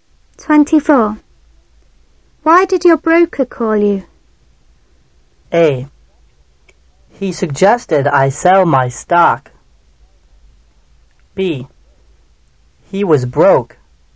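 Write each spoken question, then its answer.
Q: Why did your broker call you?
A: A: He suggested I sell my stock.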